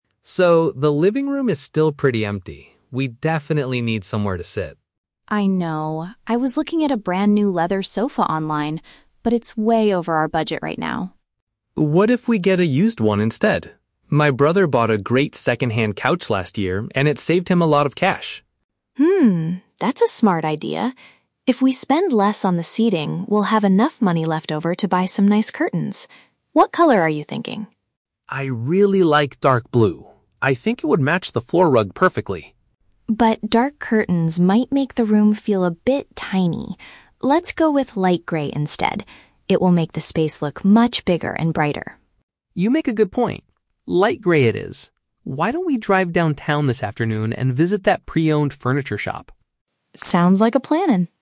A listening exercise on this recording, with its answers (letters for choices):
Listen to a conversation between a couple. Choose the correct answer (A, B, or C) for each question.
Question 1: What do they ultimately decide to do about the sofa?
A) Purchase a brand-new leather couch on the internet.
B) Ask a family member to give them an old piece of furniture.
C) Get a pre-owned item to reduce their expenses.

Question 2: Why does Emma prefer a specific color for the curtains?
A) Because it coordinates nicely with the rug on the floor.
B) Because she believes it will make the area seem more spacious.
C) Because light gray fabric is currently cheaper than dark blue.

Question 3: What is the couple's plan for this afternoon?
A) To go to a store that sells used household goods.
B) To paint the walls of their living room light gray.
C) To stay home and browse for curtains online.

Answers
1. C
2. B
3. A

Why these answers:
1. David suggests getting a "used one" (pre-owned item) because it "saved him a lot of cash" (reduce expenses), and Emma agrees it's a "smart idea". Option A is the Trap: Emma was looking at a brand-new leather sofa online, but she rejected it because it was "over our budget". Option B is also a Trap: David mentions his "brother", but his brother bought a couch; he isn't giving them one.
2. Emma wants light gray curtains because it will make the space "look much bigger" (seem more spacious). Option A is the Trap: Matching the "floor rug" is the reason David wanted the dark blue curtains, not Emma's reason for the gray ones. Option C is a plausible real-world reason to choose a color, but price was not mentioned when discussing the curtains.
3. David suggests they drive downtown to visit a "pre-owned furniture shop" (a store that sells used household goods). Option B is the Trap: They are talking about the color of the "curtains" (light gray), not painting the walls. Option C is incorrect because they are driving downtown, not staying home to look online.

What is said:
David: So, the living room is still pretty empty. We definitely need somewhere to sit.
Emma: I know. I was looking at a brand-new leather sofa online, but it's way over our budget right now.
David: What if we get a used one instead? My brother bought a great second-hand couch last year, and it saved him a lot of cash.
Emma: Hmm, that's a smart idea. If we spend less on the seating, we'll have enough money left over to buy some nice curtains. What color are you thinking?
David: I really like dark blue. I think it would match the floor rug perfectly.
Emma: But dark curtains might make the room feel a bit tiny. Let's go with light gray instead. It will make the space look much bigger and brighter.
David: You make a good point. Light gray it is. Why don't we drive downtown this afternoon and visit that pre-owned furniture shop?